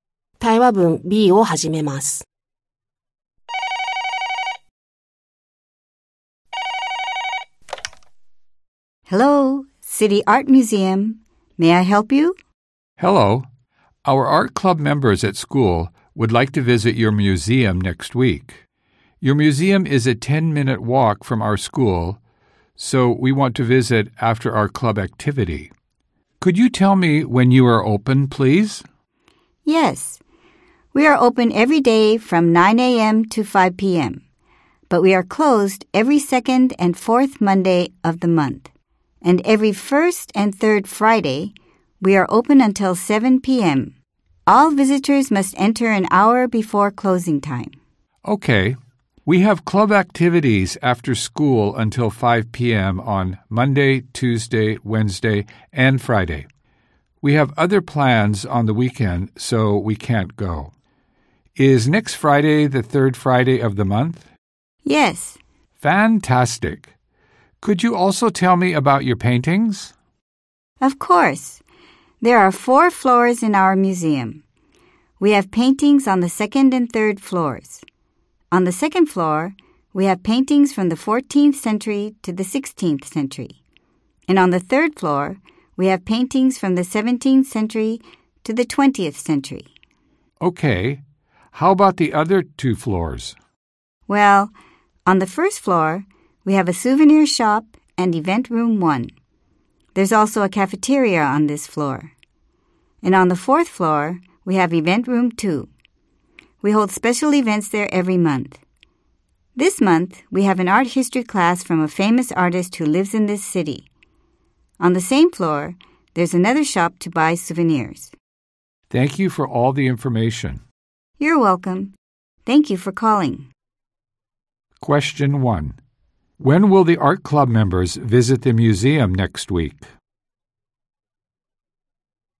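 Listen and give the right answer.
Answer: Next Friday after their club activity (after 5 p.m.)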